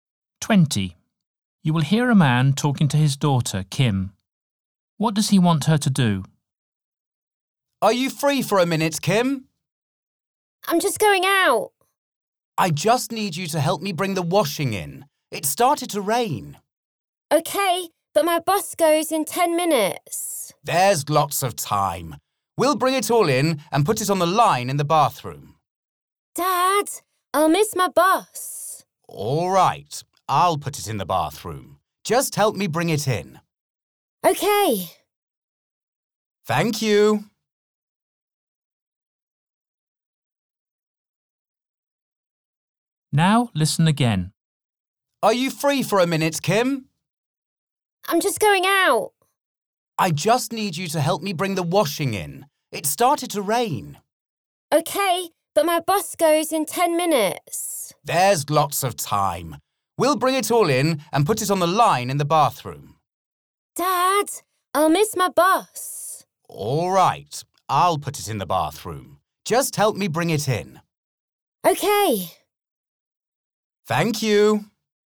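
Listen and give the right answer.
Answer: Help him bring the washing in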